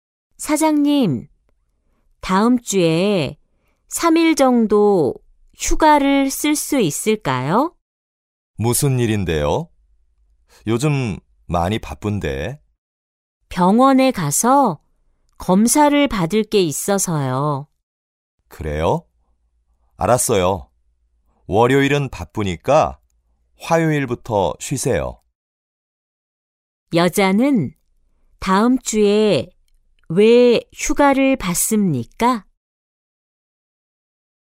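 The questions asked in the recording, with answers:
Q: 여자는 다음 주에 왜 휴가를 받습니까?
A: 병원에 가서 검사를 받아야 해서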